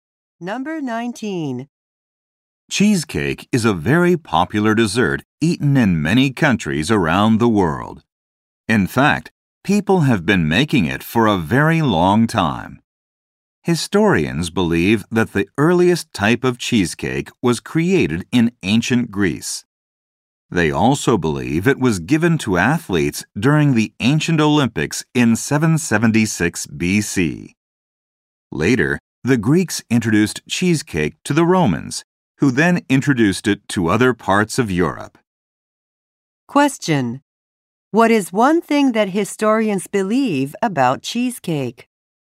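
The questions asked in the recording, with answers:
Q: What is one thing that historians believe about cheesecake?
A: It was given to athletes at the ancient Olympics.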